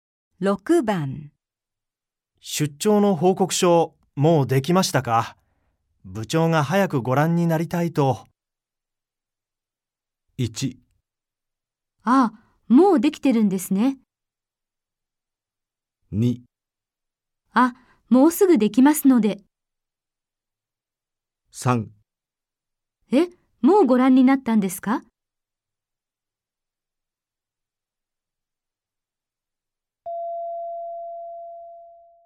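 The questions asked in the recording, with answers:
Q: 出張の報告書、もうできましたか?部長が早くご覧になりたいと。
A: 2: あ、もうすぐできますので。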